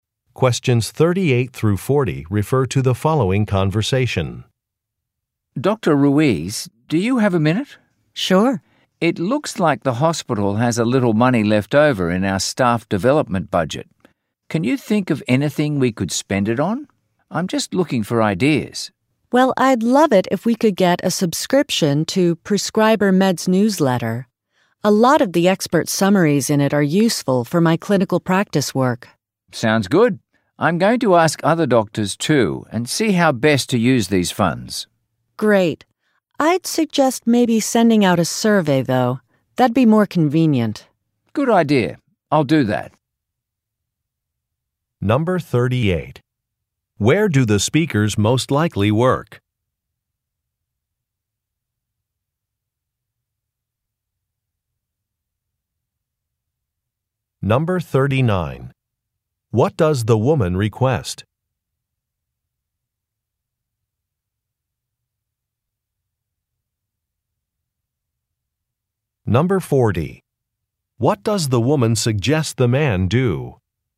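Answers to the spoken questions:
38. At a hospital
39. A subscription to a newsletter
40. Send out a survey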